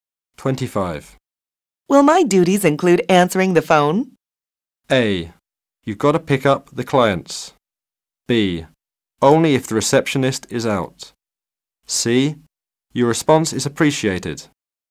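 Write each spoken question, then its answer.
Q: Will my duties include answering the phone?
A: B: Only if the receptionist is out.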